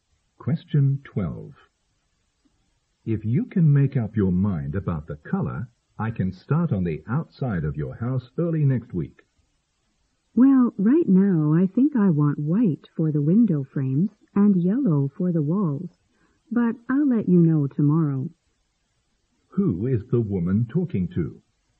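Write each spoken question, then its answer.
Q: Who is the woman talking to?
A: A house painter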